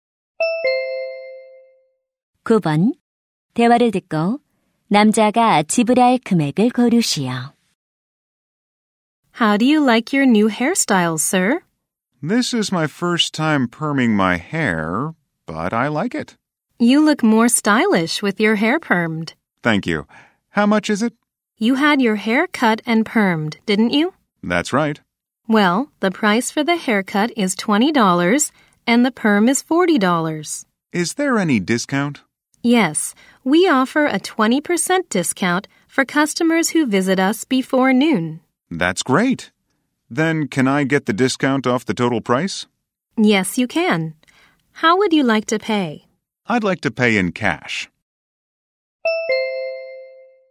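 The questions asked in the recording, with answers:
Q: 대화를 듣고 남자가 지불할 금액을 고르시오.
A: $48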